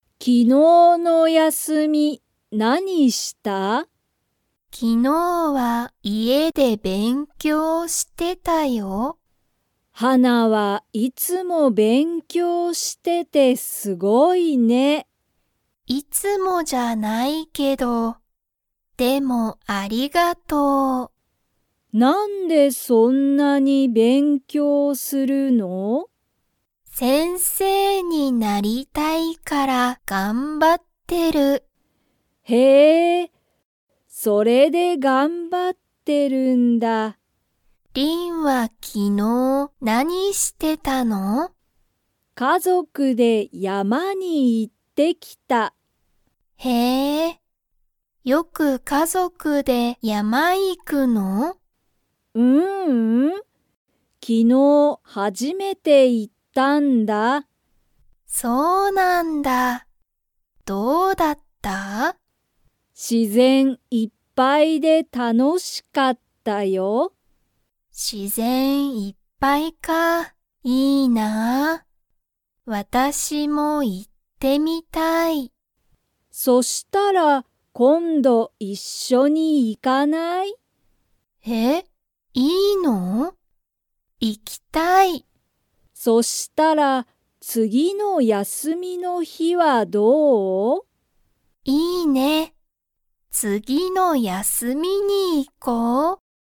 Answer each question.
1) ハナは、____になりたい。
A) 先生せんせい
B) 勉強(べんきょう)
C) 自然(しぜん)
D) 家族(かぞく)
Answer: A

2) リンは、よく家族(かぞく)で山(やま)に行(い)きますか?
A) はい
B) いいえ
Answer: B

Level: Level 2

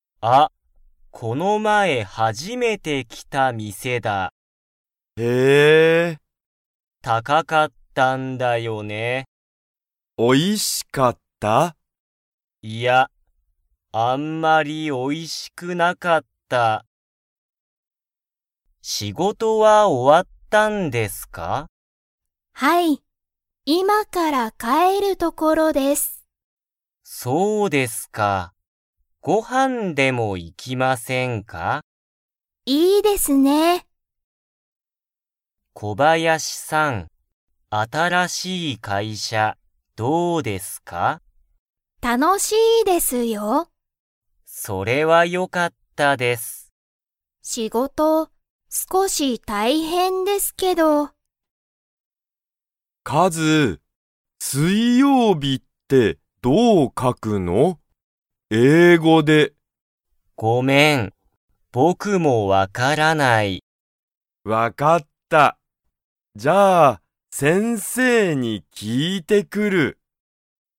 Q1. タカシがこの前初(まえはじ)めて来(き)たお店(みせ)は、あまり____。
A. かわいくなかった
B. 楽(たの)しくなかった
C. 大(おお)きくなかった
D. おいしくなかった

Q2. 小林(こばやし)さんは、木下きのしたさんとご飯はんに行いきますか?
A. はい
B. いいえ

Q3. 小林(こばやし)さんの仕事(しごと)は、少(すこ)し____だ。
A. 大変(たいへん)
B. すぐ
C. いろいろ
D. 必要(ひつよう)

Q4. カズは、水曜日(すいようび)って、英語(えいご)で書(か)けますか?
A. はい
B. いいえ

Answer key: 1D, 2A, 3A, 4B

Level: Level 1

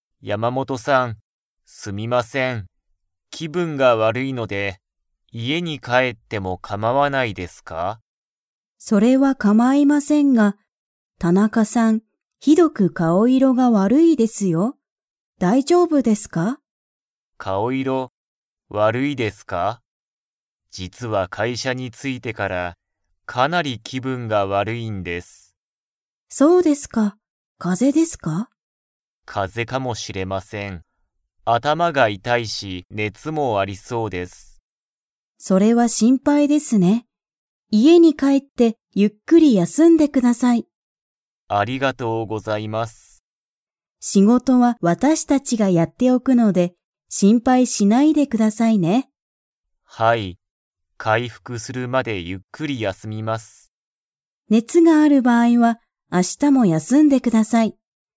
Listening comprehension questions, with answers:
Comprehension Quiz (Skip if you don't understand the conversation yet)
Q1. 田中たなかさんは、 かもしれない。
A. 風邪かぜ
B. 回復かいふく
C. 気分きぶん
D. 仕事しごと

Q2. 田中たなかさんはこのあと家いえに 。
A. 帰かえる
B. 帰かえらない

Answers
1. A
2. A

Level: Level 4

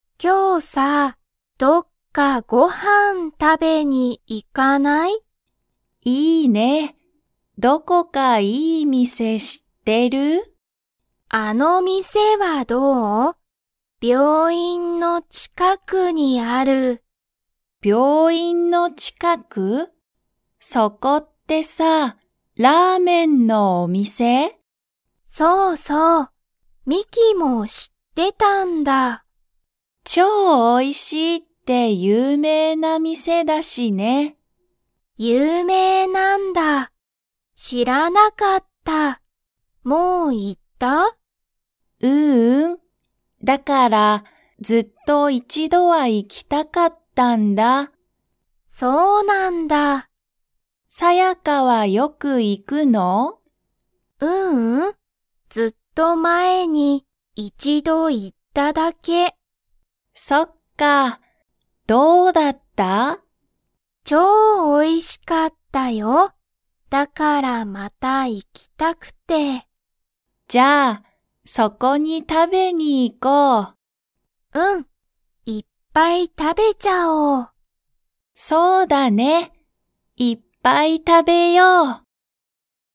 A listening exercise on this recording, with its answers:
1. その店(みせ)は、____の近(ちか)くにある。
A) 病院(びょういん)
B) ラーメン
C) 有名(ゆうめい)な店(みせ)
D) おいしい所ところ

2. ミキは、その店(みせ)にもう行(い)きましたか?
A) はい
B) いいえ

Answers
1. A
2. B

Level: Level 2

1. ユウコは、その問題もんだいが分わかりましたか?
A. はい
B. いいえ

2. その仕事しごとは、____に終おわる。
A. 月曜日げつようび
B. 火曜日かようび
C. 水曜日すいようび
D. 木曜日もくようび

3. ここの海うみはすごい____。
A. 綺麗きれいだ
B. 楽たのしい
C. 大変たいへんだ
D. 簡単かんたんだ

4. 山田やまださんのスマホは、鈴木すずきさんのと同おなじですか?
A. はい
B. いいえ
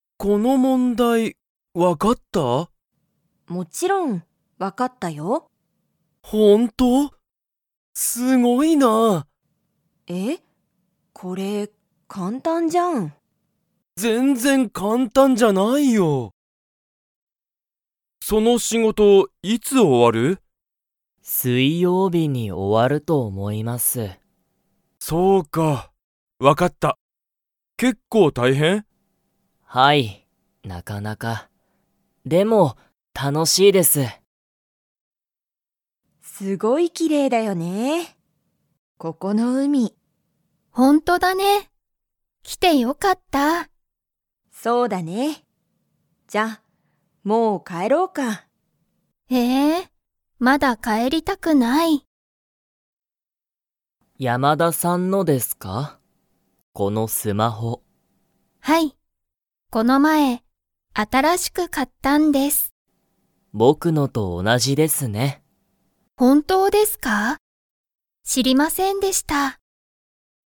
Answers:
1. A
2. C
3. A
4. A

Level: Level 1

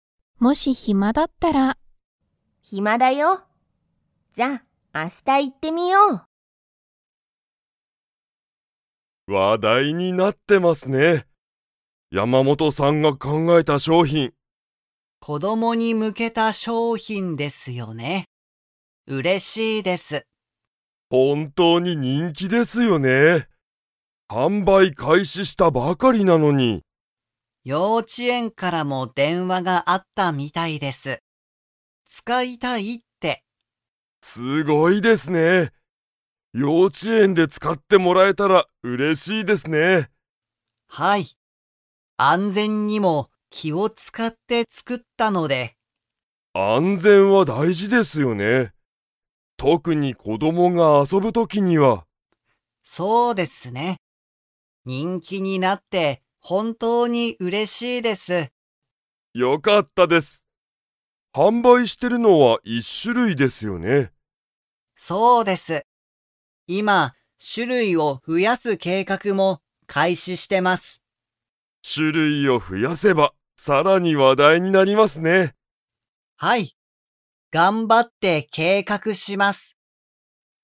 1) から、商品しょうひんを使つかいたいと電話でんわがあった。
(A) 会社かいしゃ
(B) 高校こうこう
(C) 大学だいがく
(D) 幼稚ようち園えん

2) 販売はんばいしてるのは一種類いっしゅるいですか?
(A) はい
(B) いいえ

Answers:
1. D
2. A

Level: Level 4

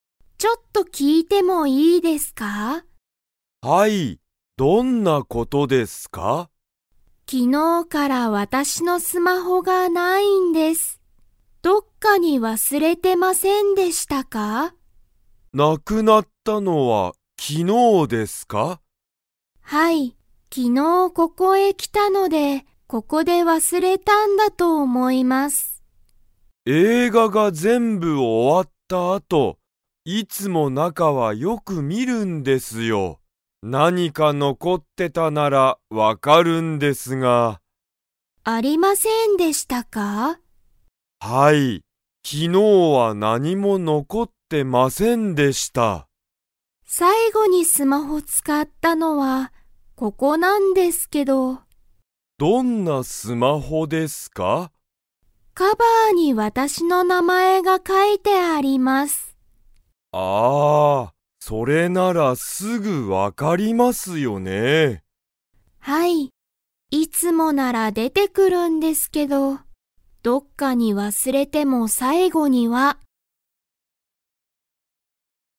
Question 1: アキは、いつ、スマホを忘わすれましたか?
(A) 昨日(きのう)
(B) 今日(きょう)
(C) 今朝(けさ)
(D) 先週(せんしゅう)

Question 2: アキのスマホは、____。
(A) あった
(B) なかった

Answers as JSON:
{"1": "A", "2": "B"}

